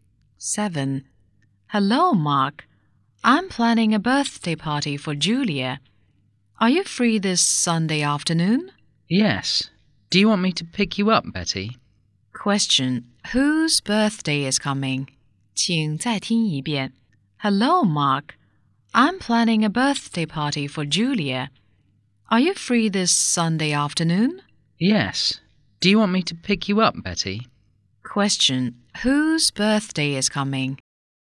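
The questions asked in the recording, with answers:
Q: Question, whose birthday is coming?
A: Julia's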